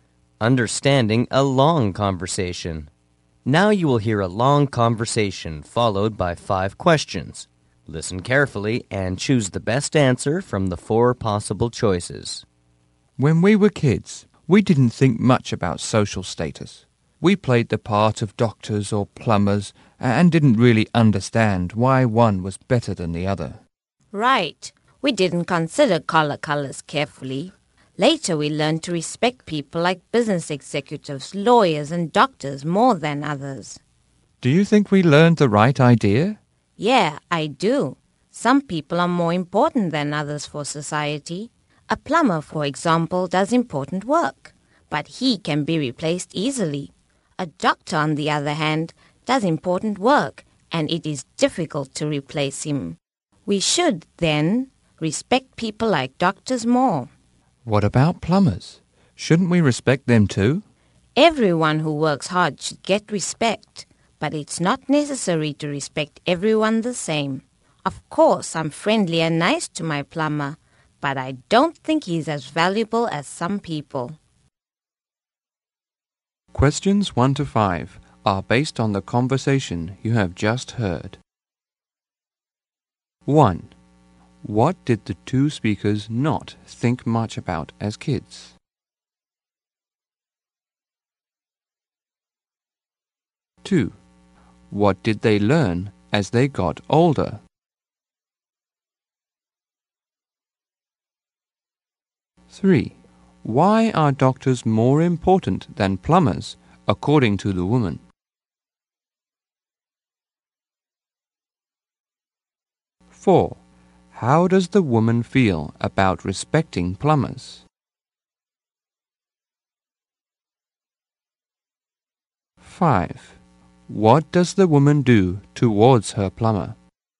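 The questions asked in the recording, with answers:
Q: What did the two speakers not think much about as kids?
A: Social status.

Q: What did they learn as they got older?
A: To respect executives, lawyers and doctors more than others.

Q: Why are doctors more important than plumbers, according to the woman?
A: Doctors are difficult to replace.

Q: How does the woman feel about respecting plumbers?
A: They deserve respect, but not the same as everyone.

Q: What does the woman do towards her plumber?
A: She is friendly and nice to him.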